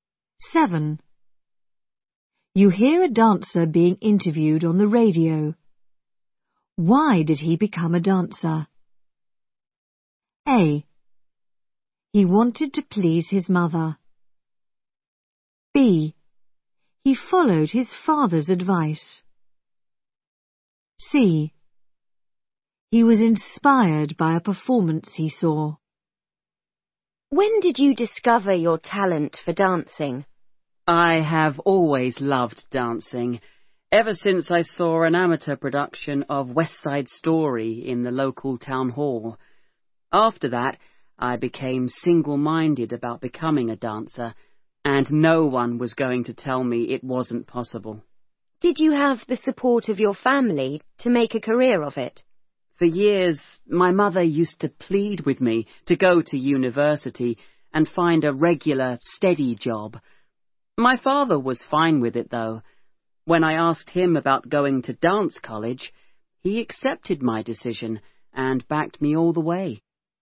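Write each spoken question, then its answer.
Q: Why did he become a dancer?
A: C: He was inspired by a performance he saw.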